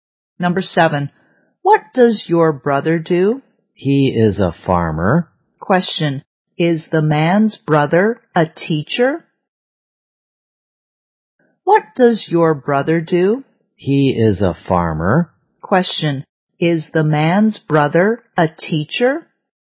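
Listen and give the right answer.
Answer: No, he is a farmer.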